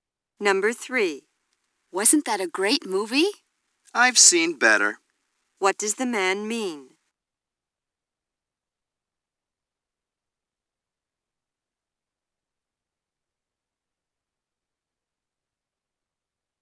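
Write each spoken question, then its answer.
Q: What does the man mean?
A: He didn't think the movie was very good.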